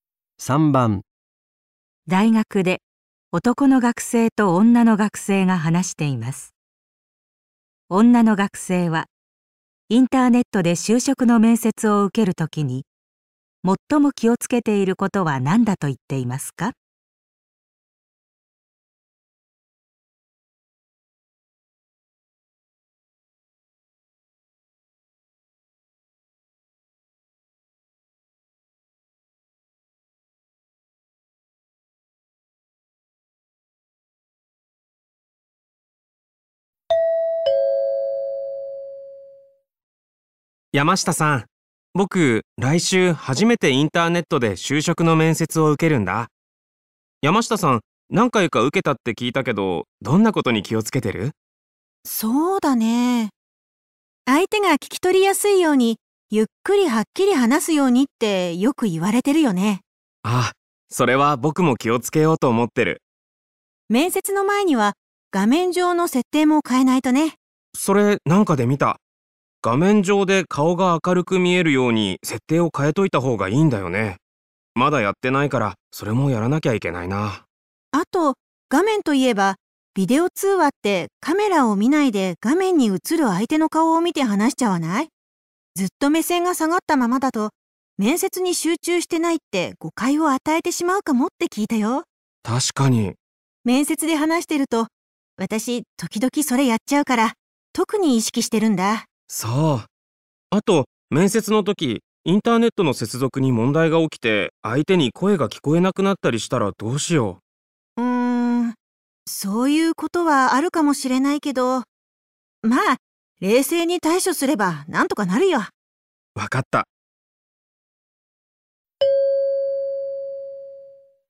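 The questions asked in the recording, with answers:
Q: 女の学生はインターネットで就職の面接を受けるときに最も気をつけていることは何だと言っていますか?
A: 画面の相手の顔ではなくカメラを見て話すこと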